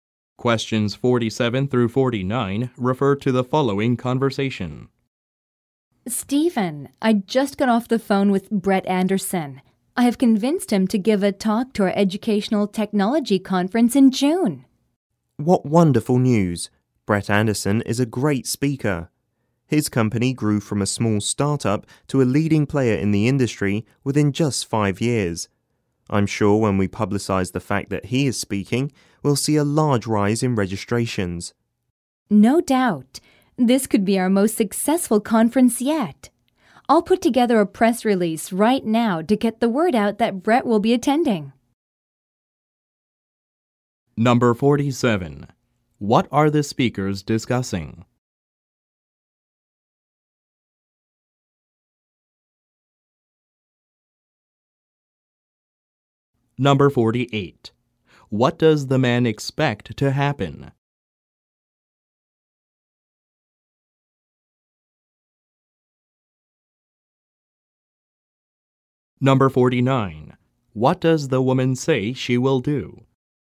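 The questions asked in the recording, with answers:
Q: What are the speakers discussing?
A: A guest speaker, Brett Anderson, agreeing to talk at their educational technology conference

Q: What does the man expect to happen?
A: A large rise in conference registrations

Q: What does the woman say she will do?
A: Put together a press release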